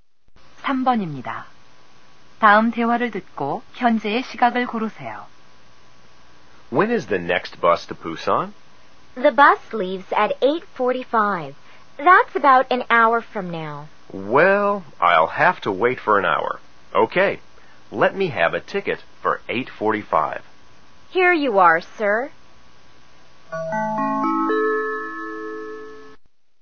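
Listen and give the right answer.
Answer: 7시 45분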